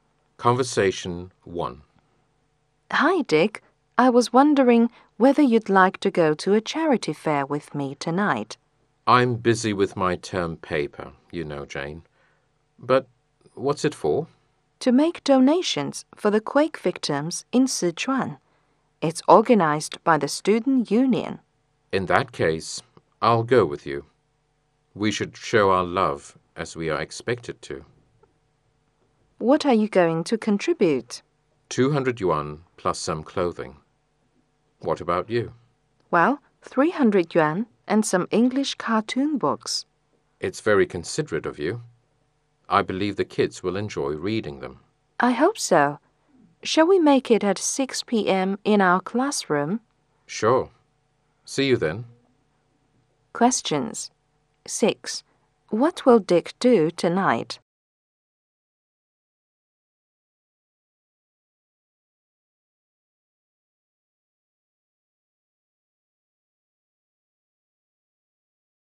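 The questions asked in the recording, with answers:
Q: What will Dick do tonight?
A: Go to a charity fair with Jane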